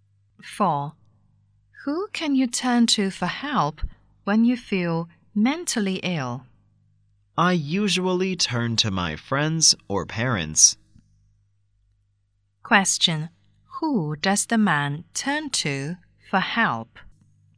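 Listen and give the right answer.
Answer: His friends or parents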